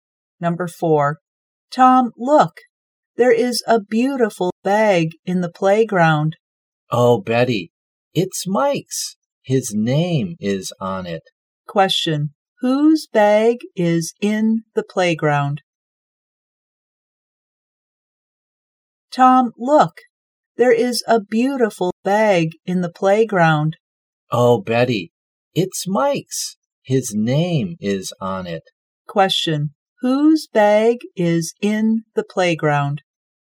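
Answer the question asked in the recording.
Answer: Mike's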